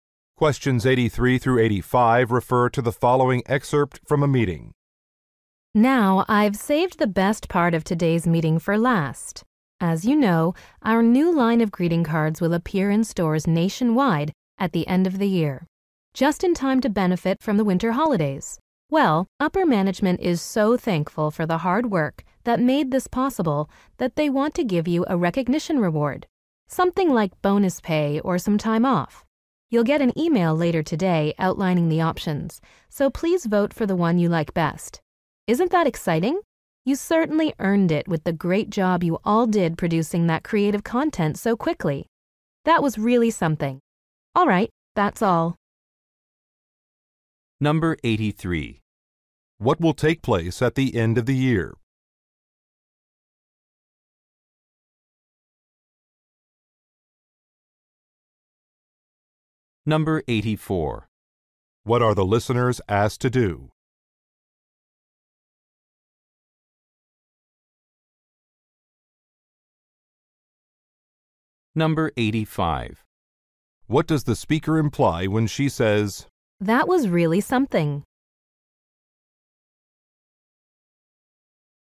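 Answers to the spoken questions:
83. A new line of greeting cards will appear in stores
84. Vote for their preferred reward
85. She is impressed that they produced the creative content so quickly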